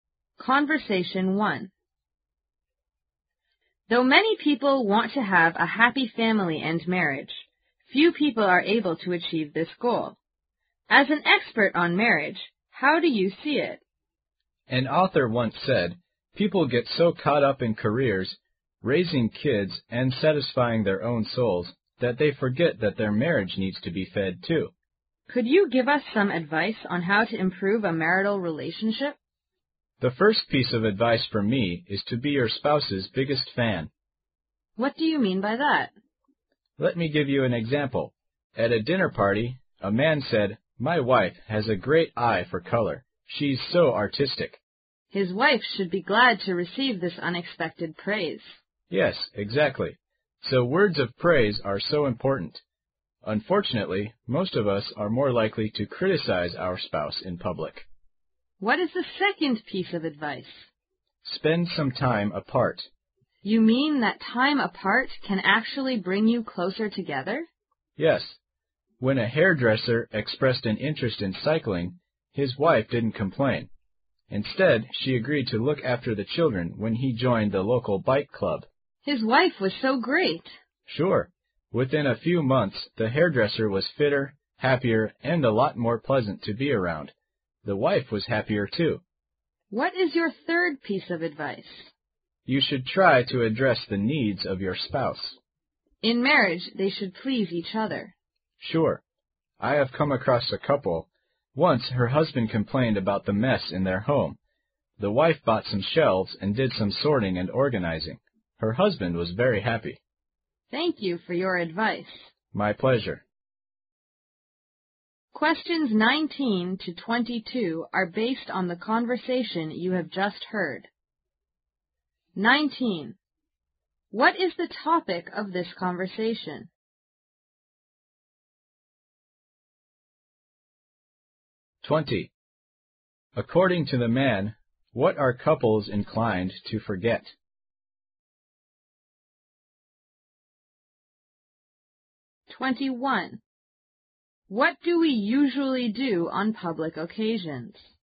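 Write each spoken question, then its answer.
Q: What is the topic of this conversation?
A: How to improve a marriage

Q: According to the man, what are couples inclined to forget?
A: That their marriage needs to be fed too

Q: What do we usually do on public occasions?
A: Criticize our spouse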